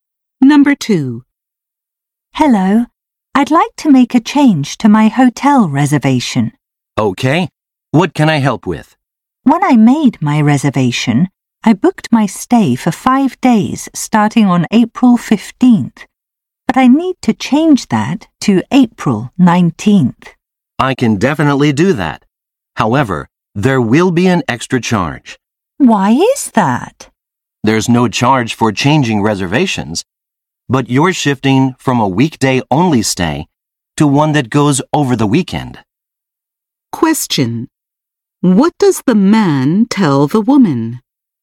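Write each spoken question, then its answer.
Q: What does the man tell the woman?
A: There will be an extra charge because her new stay goes over the weekend.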